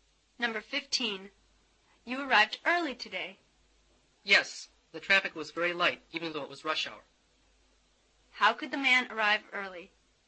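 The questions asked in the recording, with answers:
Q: How could the man arrive early?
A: The traffic was very light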